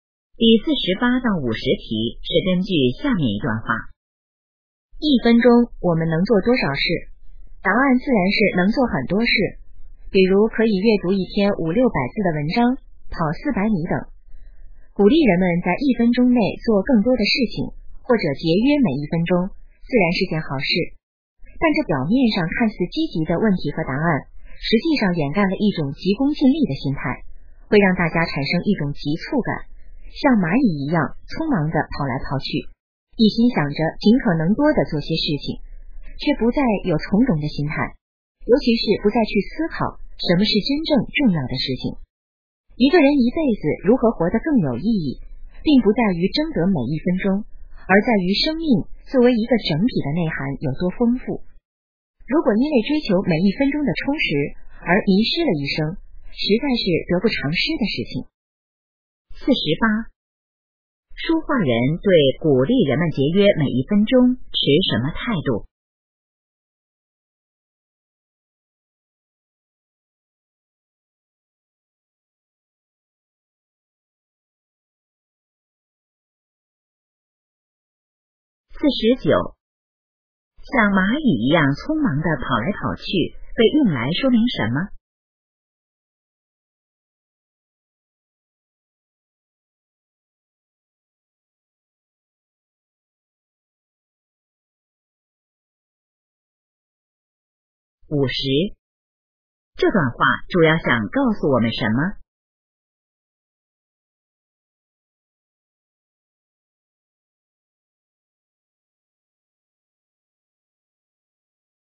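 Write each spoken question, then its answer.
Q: 像蚂蚁一样匆忙地跑来跑去,被用来说明什么?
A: 人们急功近利,缺少从容的心态

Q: 这段话主要想告诉我们什么?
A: 人生的意义不在于争得每一分钟,而在于生命整体内涵的丰富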